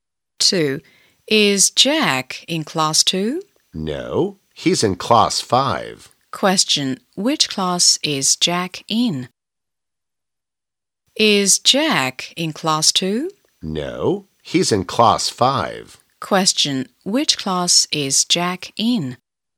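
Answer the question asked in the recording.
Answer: Class 5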